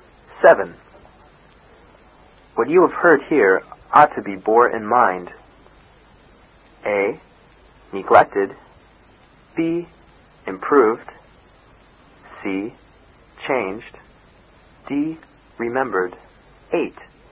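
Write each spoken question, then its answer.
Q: What you have heard here ought to be borne in mind.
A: D: Remembered.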